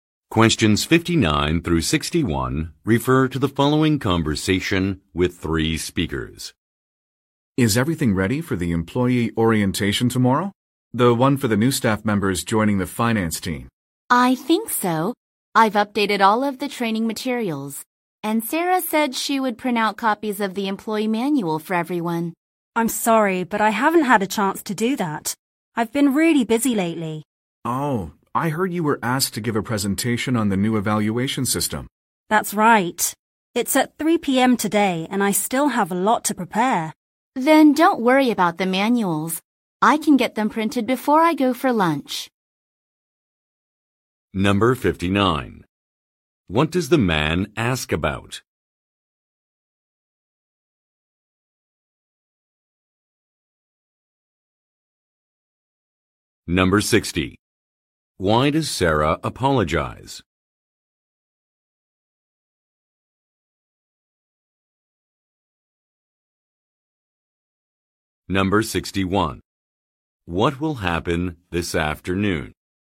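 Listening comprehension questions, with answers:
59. What does the man ask about?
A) Preparations for an upcoming event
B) Revisions to an employee handbook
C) Decisions about a training program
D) Qualifications of a recent hire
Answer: A) Preparations for an upcoming event

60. Why does Sarah apologize?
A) She printed insufficient copies of a manual.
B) She notified the wrong staff member.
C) She could not attend an orientation.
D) She did not complete a task.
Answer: D) She did not complete a task.

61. What will happen this afternoon?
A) A report will be submitted.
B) An evaluation will be conducted.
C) A presentation will be given.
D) A system will be updated.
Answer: C) A presentation will be given.

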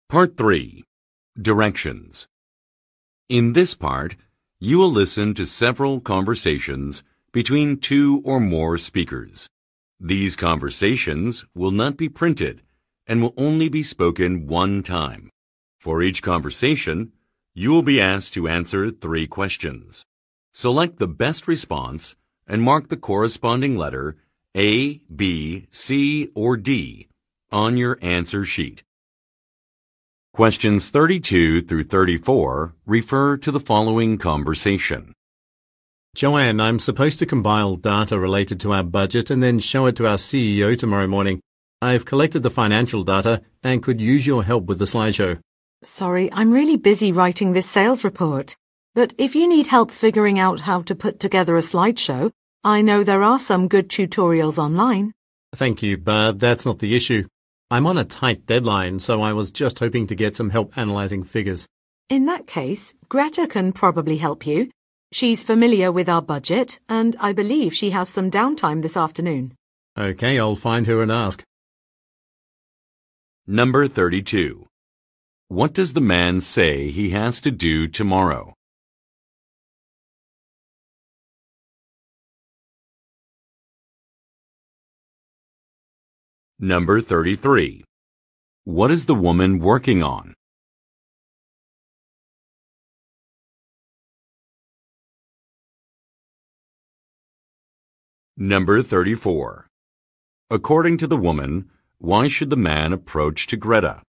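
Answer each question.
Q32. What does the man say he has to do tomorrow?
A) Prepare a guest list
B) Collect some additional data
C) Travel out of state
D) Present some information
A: D) Present some information

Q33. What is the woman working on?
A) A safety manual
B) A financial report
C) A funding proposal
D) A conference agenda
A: B) A financial report

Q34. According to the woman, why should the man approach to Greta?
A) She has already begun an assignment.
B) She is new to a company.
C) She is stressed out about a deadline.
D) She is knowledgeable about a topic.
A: D) She is knowledgeable about a topic.

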